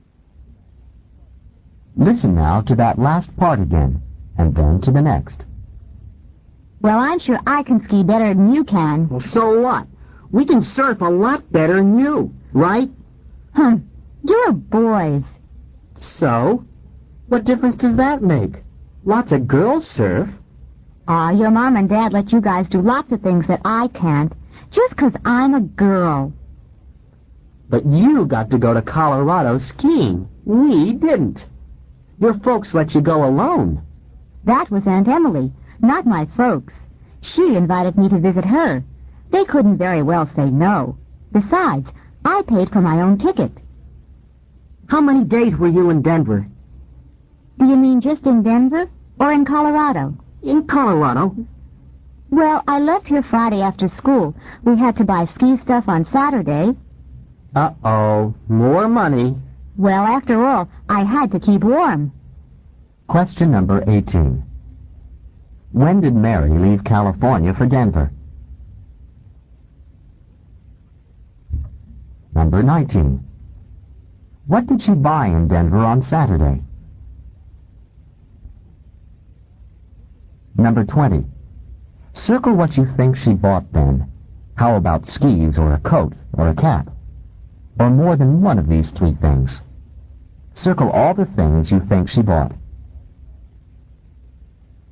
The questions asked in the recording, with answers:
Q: When did Mary leave California for Denver?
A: on Friday after school.

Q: What did she buy in Denver on Saturday?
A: ski stuff, S-T-U-F-F.